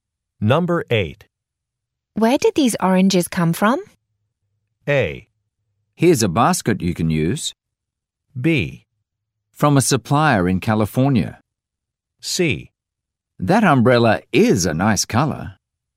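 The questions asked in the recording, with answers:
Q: Where did these oranges come from?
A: B: From a supplier in California.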